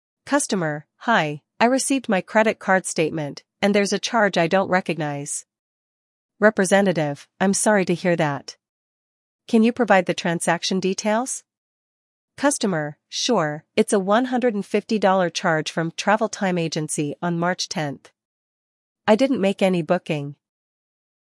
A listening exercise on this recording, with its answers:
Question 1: What issue does the customer report?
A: Unrecognized charge

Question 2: What is the amount of the unrecognized charge?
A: $150

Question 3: When did the transaction occur?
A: March 10th

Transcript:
Customer: Hi, I received my credit card statement, and there's a charge I don't recognize.
Representative: I'm sorry to hear that. Can you provide the transaction details?
Customer: Sure, it's a $150 charge from "Travel Time Agency" on March 10th. I didn't make any booking.